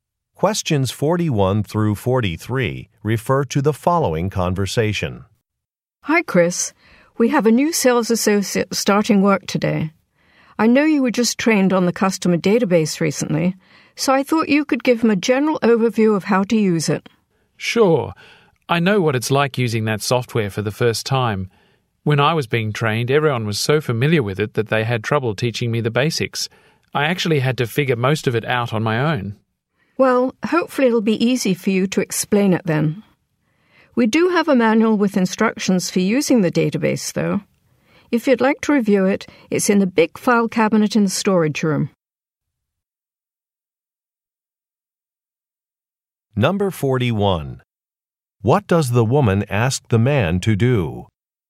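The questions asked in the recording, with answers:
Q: What does the woman ask the man to do?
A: Give the new sales associate an overview of the customer database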